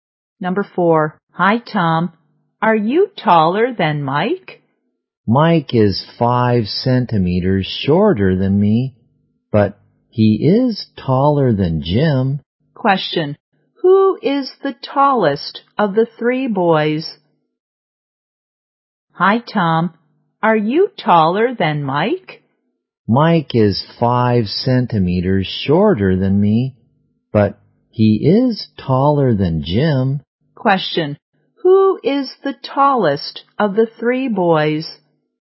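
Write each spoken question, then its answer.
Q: Question. Who is the tallest of the three boys?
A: Tom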